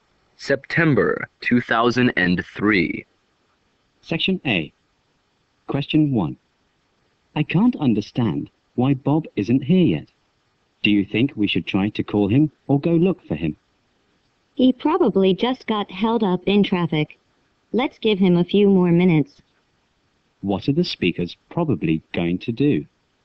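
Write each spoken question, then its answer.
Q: What are the speakers probably going to do?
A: Wait a few more minutes for Bob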